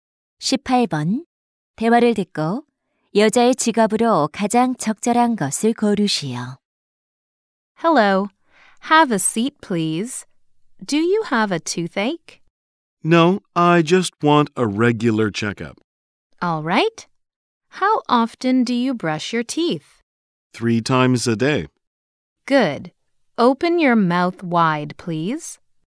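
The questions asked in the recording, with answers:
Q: 대화를 듣고 여자의 직업으로 가장 적절한 것을 고르시오.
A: 치과의사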